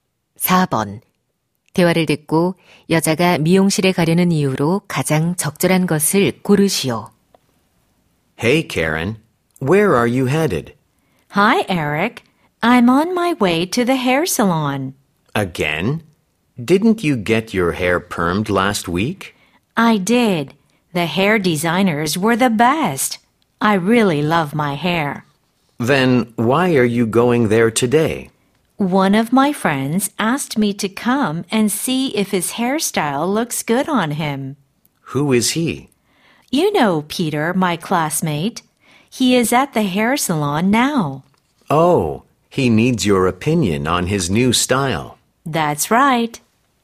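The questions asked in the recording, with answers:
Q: 대화를 듣고 여자가 미용실에 가려는 이유로 가장 적절한 것을 고르시오.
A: 친구의 헤어스타일이 어울리는지 봐 주려고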